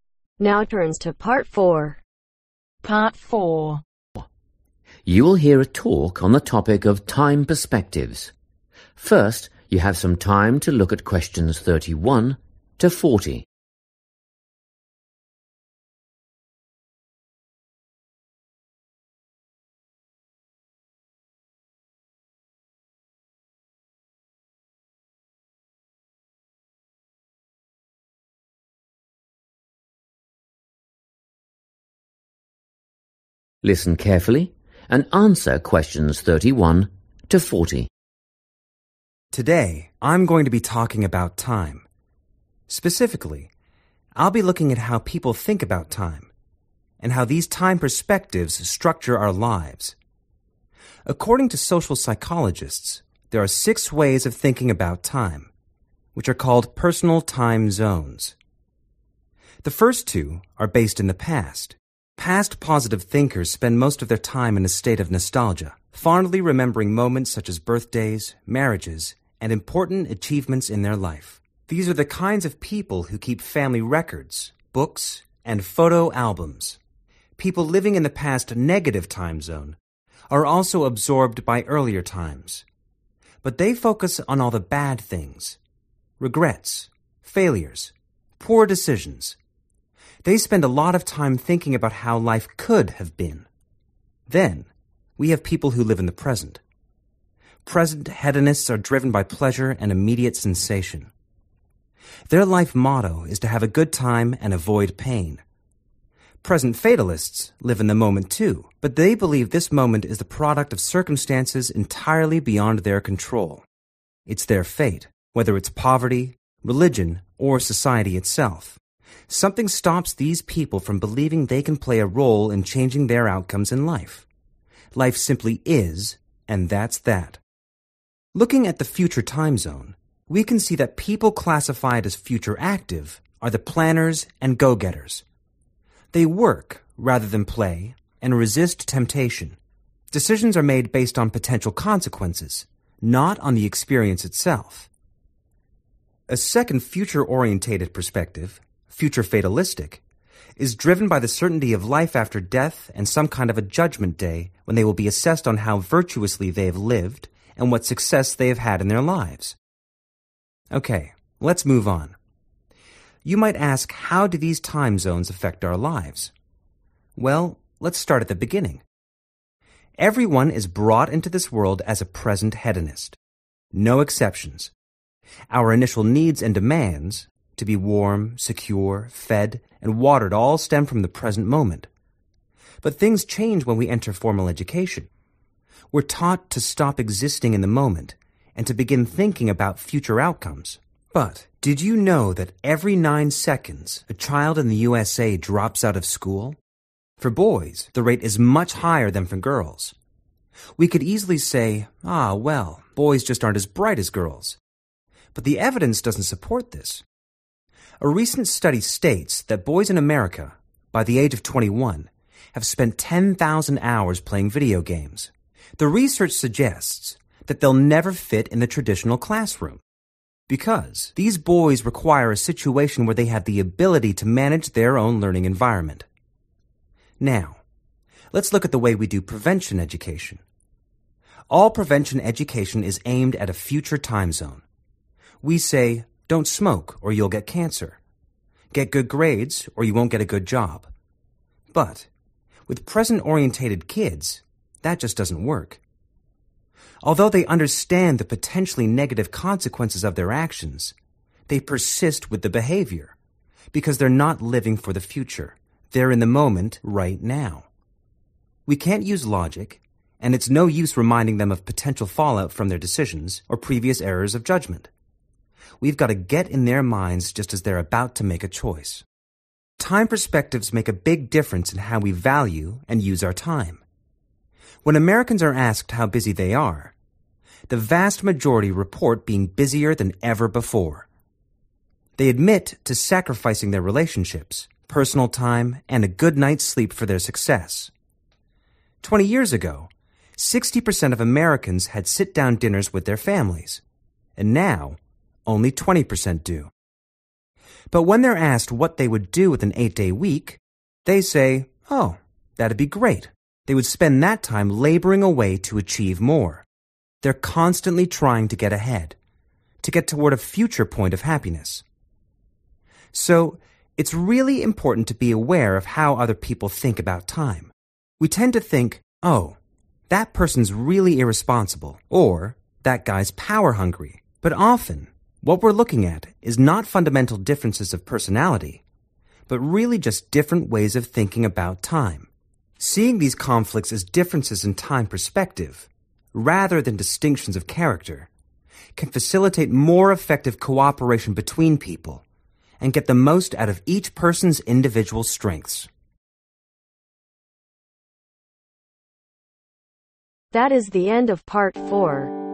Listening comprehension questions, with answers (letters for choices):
Choose correct letter A , B or C.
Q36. We are all present hedonists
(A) at school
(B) at birth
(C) while eating and drinking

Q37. American boys drop out of school at a higher than girls because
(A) they need to be in control of the way they learn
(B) they play video games instead of doing school work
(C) they are not as intelligent as girls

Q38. Present-orientated children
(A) do not realize present actions can have negative future effects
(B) are unable to learn lessons from past mistakes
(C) know what could happen if they do something bad, but do it anyway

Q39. If Americans had an extra day per week, they would spend it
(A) working harder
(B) building relationships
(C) sharing family meals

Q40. Understanding how people think about time can help us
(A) become more virtuous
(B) work together better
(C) identify careless or ambitious people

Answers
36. B
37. A
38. C
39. A
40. B